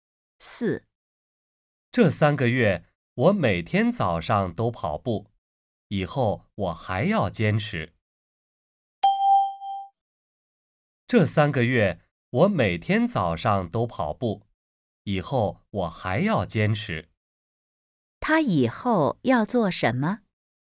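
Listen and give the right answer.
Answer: 坚持每天早上跑步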